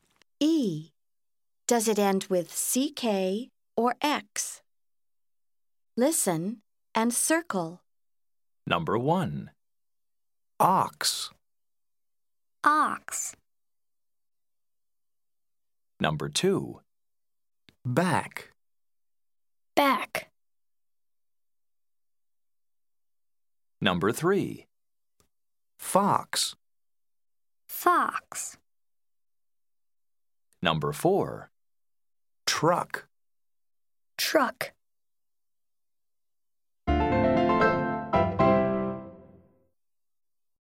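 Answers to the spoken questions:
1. X (ox)
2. CK (back)
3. X (fox)
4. CK (truck)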